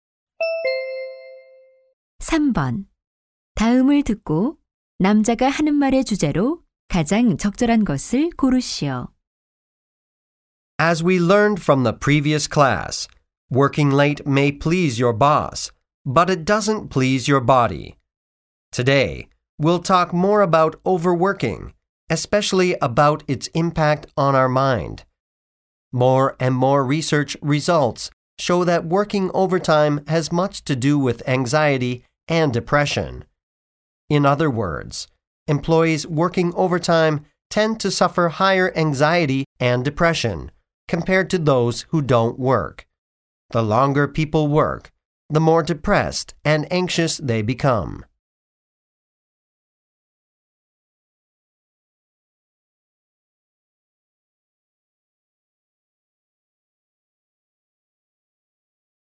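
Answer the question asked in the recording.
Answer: 과로가 정신 건강(불안과 우울)에 미치는 영향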